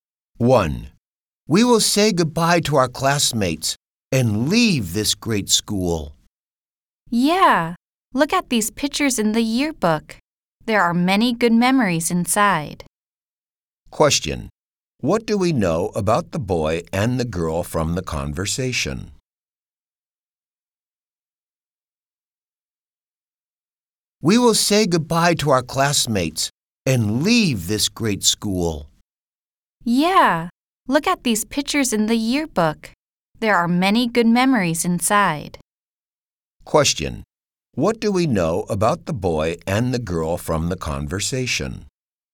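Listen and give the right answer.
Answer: They are graduating and leaving their school.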